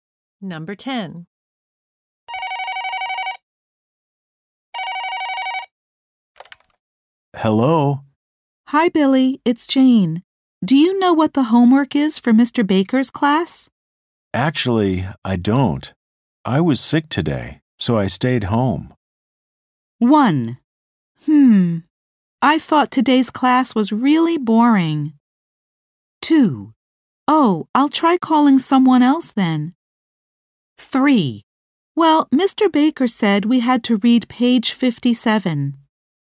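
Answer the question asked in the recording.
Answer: 2: Oh, I'll try calling someone else then.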